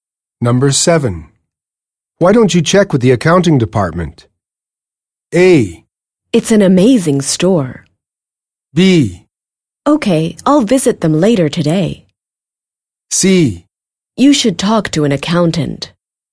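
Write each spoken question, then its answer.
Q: Why don't you check with the accounting department?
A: B: Okay, I'll visit them later today.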